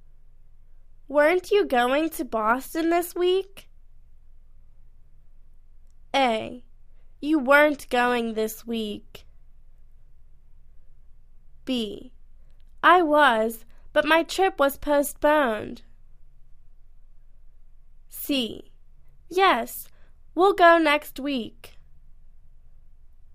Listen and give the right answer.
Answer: I was, but my trip was postponed.